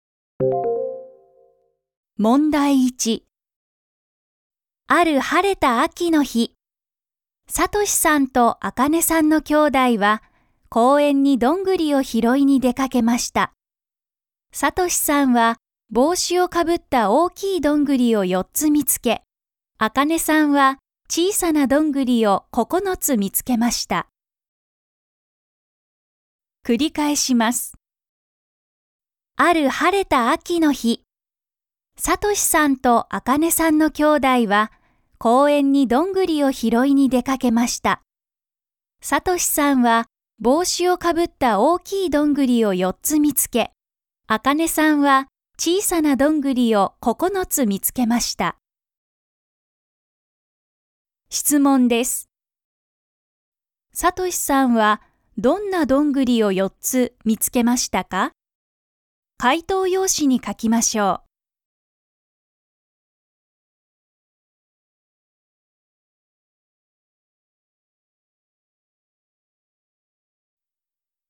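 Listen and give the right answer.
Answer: 帽子をかぶった大きいどんぐり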